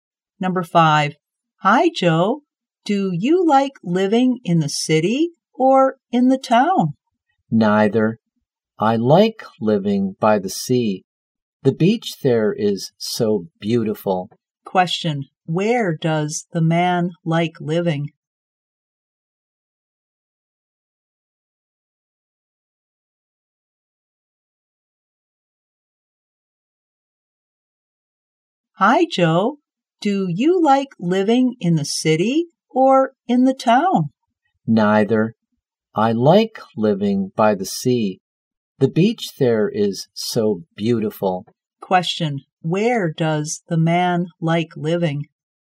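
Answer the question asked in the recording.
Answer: By the sea.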